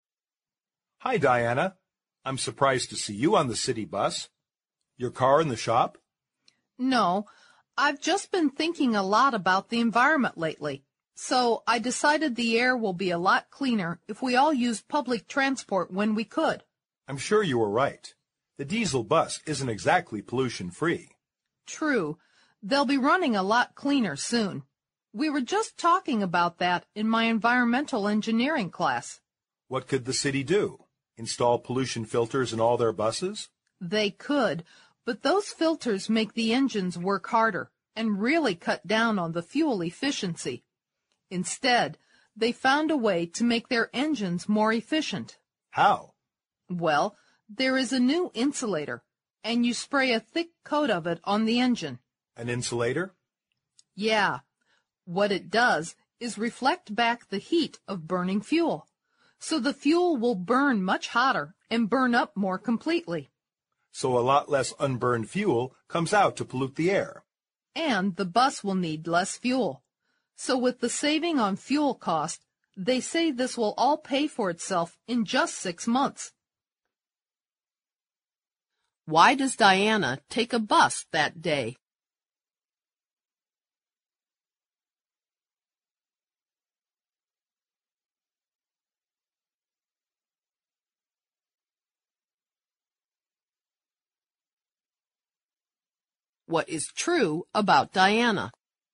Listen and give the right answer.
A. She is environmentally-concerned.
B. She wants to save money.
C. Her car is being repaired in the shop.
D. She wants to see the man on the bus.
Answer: A. She is environmentally-concerned.

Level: 大学英语四级